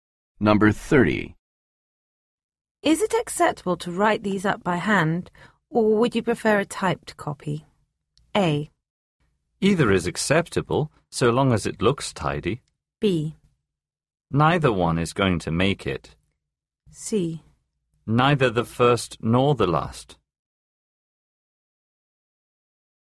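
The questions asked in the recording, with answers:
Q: Is it acceptable to write these up by hand, or would you prefer a typed copy?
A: A: Either is acceptable, so long as it looks tidy.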